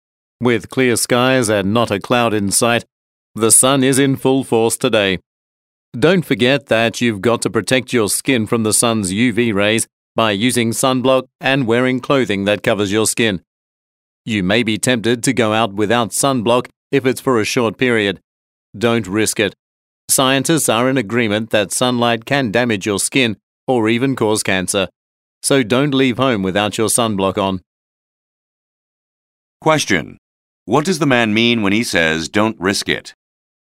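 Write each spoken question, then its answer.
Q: What does the man mean when he says, don't risk it?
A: You should wear sunblock even if you only go out for a short time, because sunlight can damage your skin or cause cancer.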